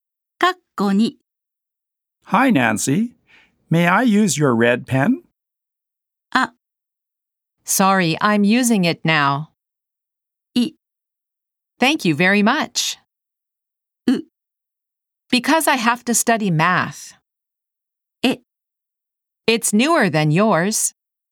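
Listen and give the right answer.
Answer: A: Sorry, I'm using it now.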